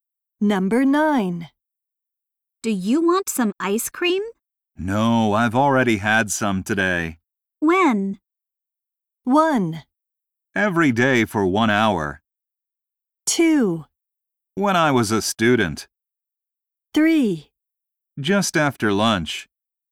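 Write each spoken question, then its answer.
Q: When?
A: 3: Just after lunch.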